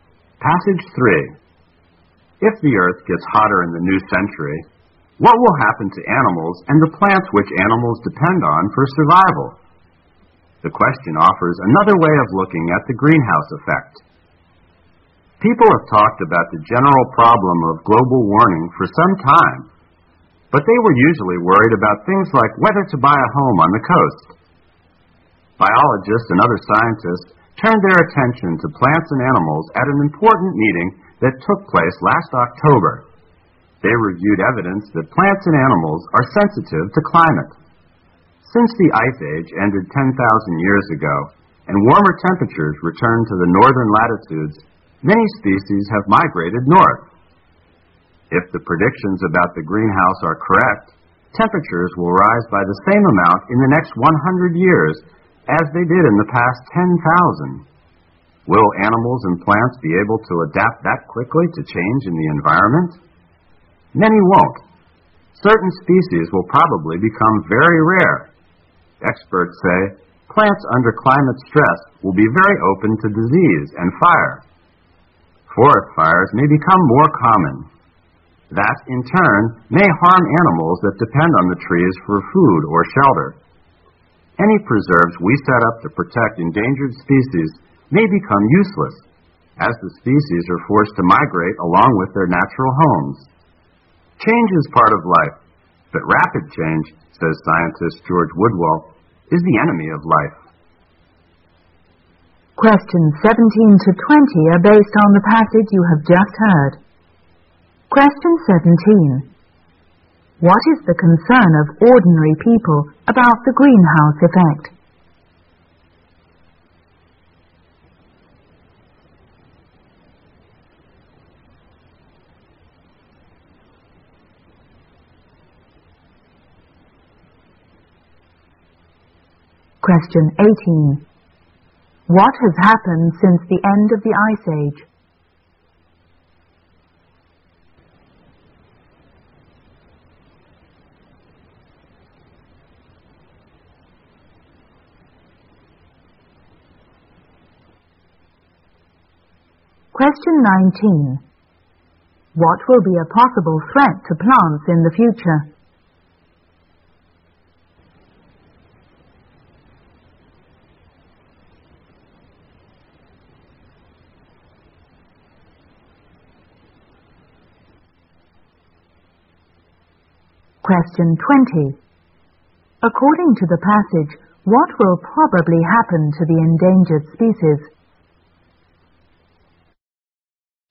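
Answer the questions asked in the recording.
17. Whether to buy a home on the coast
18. Many species have migrated north
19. Disease and fire caused by climate stress
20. They will be forced to migrate with their natural homes, making preserves useless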